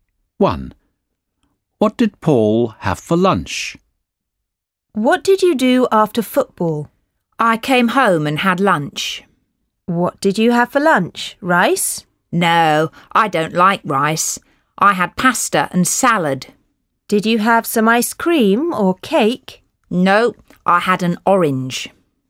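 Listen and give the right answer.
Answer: Pasta, salad and an orange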